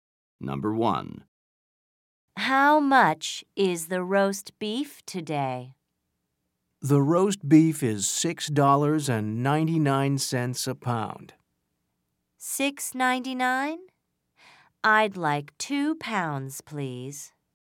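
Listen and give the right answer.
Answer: $6.99 a pound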